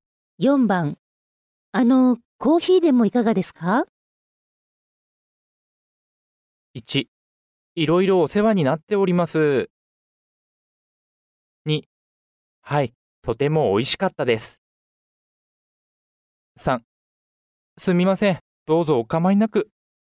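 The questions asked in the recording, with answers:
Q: コーヒーでもいかがですか?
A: 3: すみません、どうぞお構いなく。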